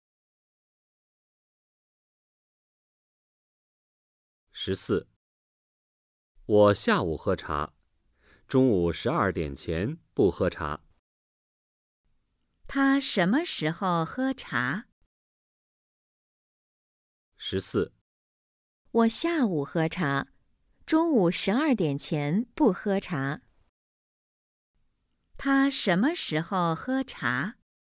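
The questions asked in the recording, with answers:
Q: 他什么时候喝茶?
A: 下午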